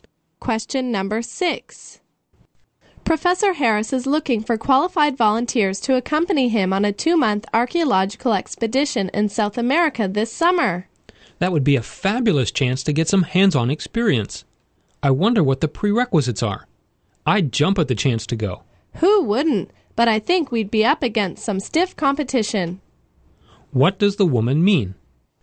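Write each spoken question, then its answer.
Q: What does the woman mean?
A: Many people will want to go, so it will be hard to be chosen.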